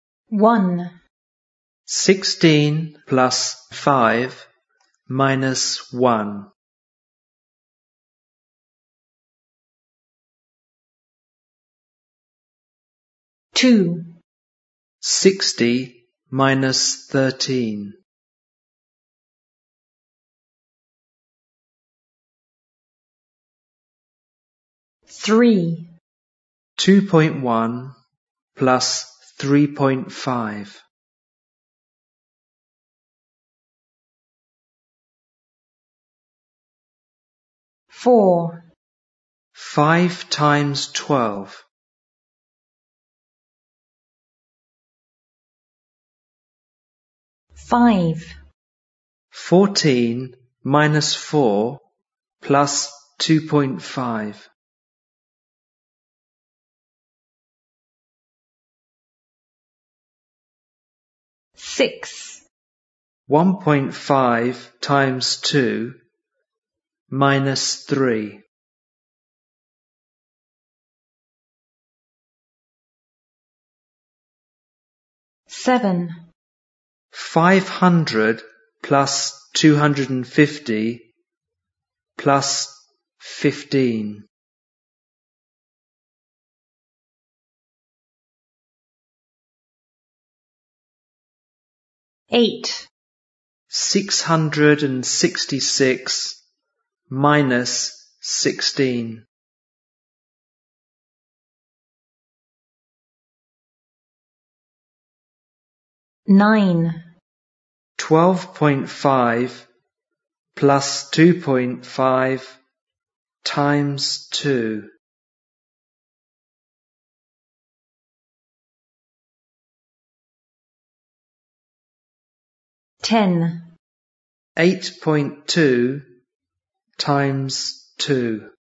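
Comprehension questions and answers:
Listen and write the answers to these sums.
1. 16 + 5 – 1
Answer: 20

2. 60 – 13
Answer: 47

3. 2.1 + 3.5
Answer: 5.6

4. 5 x 12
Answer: 60

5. 14 – 4 + 2.5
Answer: 12.5

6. 1.5 x 2 – 3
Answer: 0

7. 500 + 250 + 15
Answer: 765

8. 666 – 16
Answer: 650

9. 12.5 + 2.5 x 2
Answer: 30

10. 8.2 x 2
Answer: 16.4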